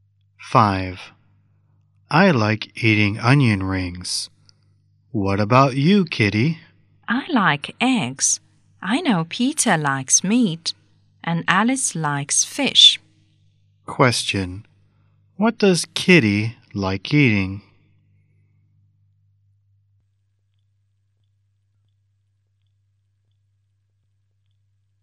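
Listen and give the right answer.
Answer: Eggs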